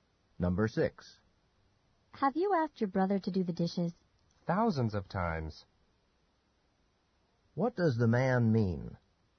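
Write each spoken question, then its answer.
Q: What does the man mean?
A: He has asked his brother many times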